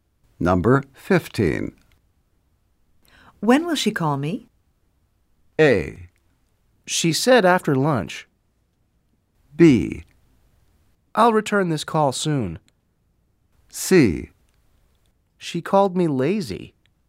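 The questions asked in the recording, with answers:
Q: When will she call me?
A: A: She said after lunch.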